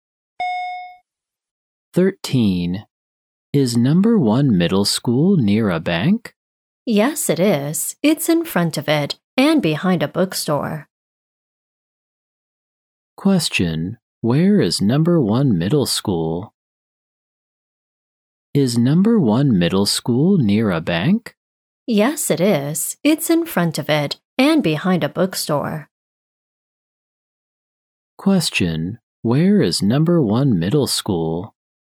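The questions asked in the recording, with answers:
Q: Where is number 1 middle school?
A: In front of a bank and behind a bookstore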